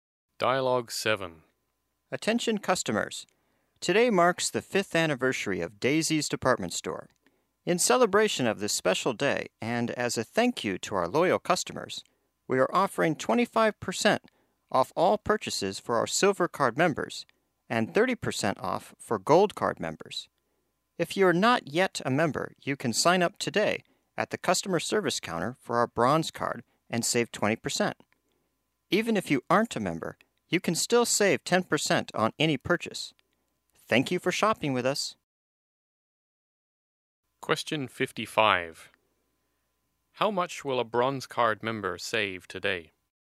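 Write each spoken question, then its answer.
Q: How much will a Bronze Card member save today?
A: 20%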